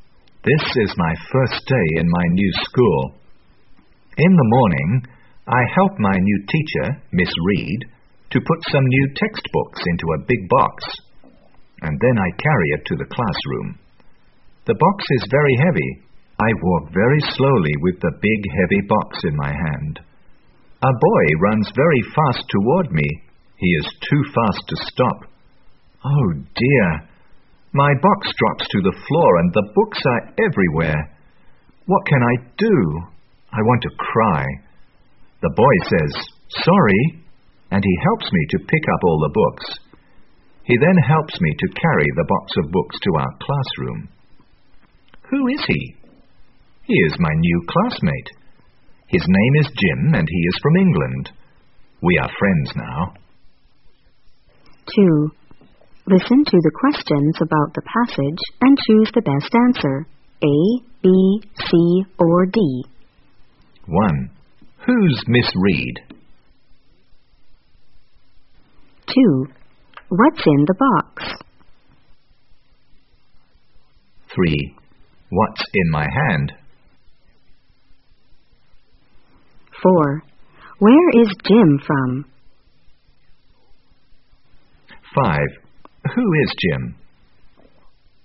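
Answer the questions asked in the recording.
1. My new teacher
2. New textbooks
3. A big heavy box of books
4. England
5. My new classmate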